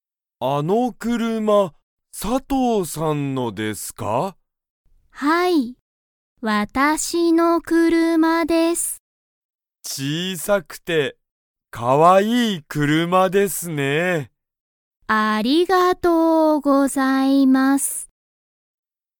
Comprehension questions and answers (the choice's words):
佐藤(さとう)さんの車(くるま)は大(おお)きいですか?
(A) はい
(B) いいえ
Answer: いいえ

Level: Level 1